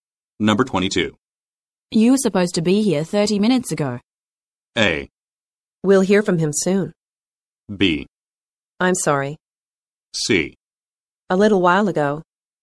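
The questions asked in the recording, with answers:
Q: You were supposed to be here 30 minutes ago.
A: B: I'm sorry.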